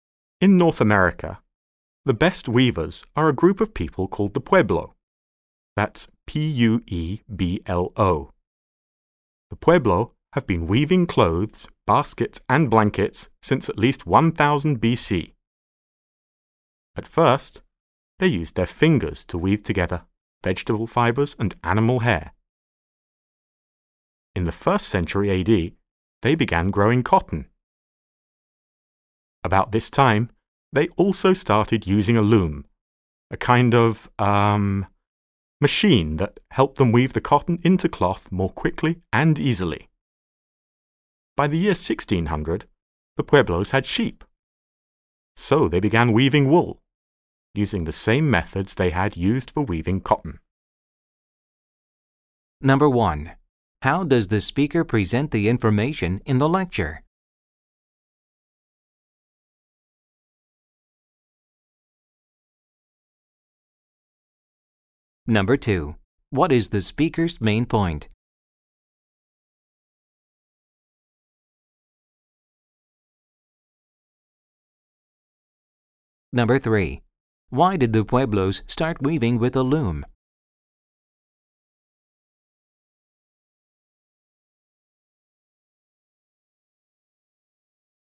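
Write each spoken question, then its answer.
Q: Why did the Pueblos start weaving with a loom?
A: It helped them weave cotton into cloth more quickly and easily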